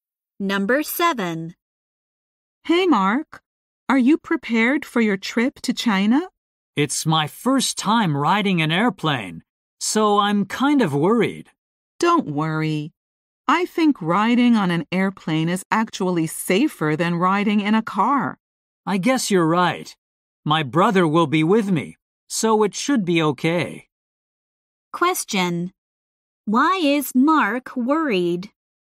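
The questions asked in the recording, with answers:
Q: Why is Mark worried?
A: It is his first time riding an airplane.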